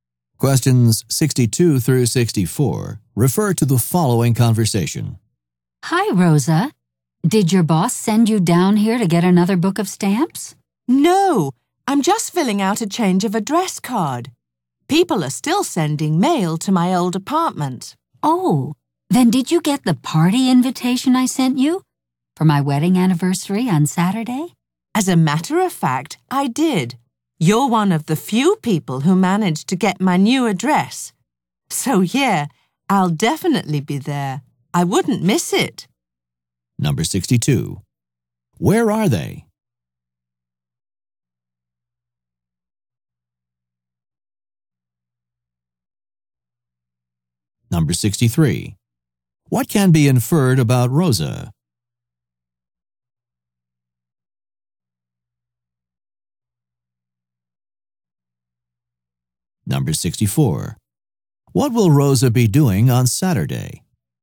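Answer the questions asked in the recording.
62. At a post office
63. She recently moved
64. Going to a wedding anniversary party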